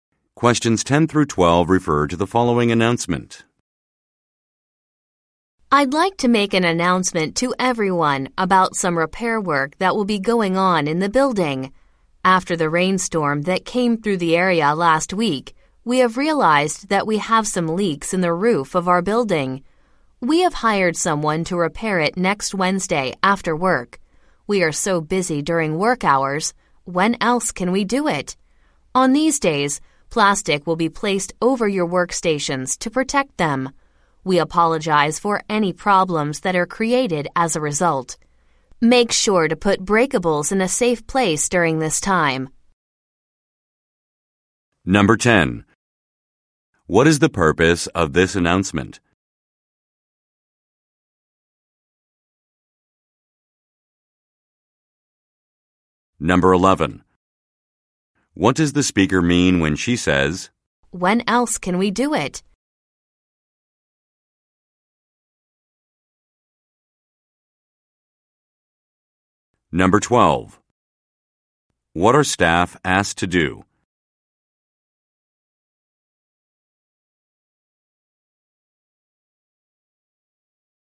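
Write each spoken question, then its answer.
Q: What is the purpose of this announcement?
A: To announce roof repair work

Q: What does the speaker mean when she says,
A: The repair must be done after work because staff are too busy during work hours

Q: What are staff asked to do?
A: Put breakables in a safe place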